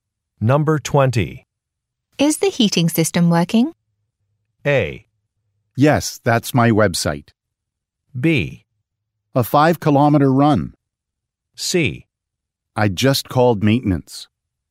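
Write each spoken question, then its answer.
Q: Is the heating system working?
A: C: I just called maintenance.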